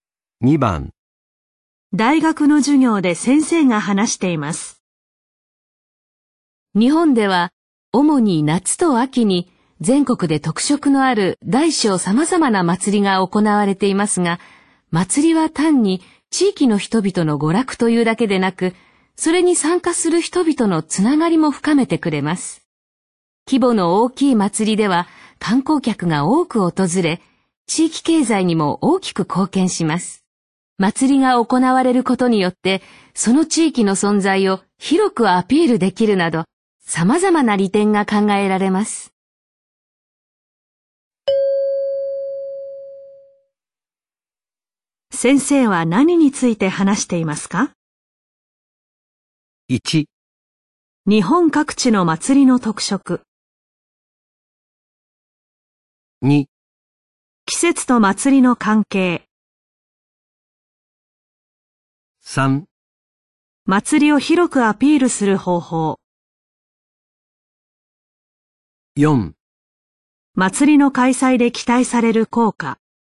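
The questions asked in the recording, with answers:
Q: 先生は何について話していますか?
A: 4: 祭りの開催で期待される効果。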